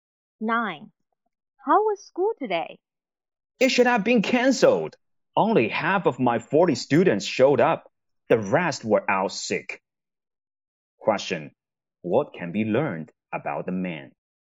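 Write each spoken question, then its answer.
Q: What can be learned about the man?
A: He is a teacher and half his students were absent sick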